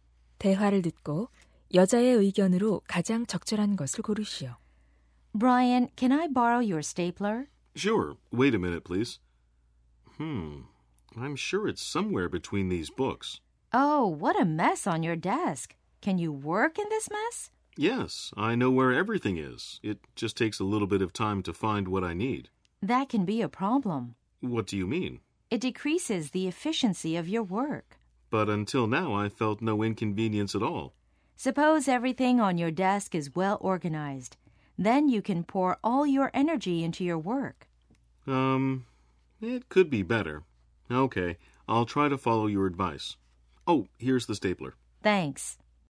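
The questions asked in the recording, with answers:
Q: 대화를 듣고 여자의 의견으로 가장 적절한 것을 고르시오.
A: 책상을 잘 정리하면 업무 효율이 높아진다.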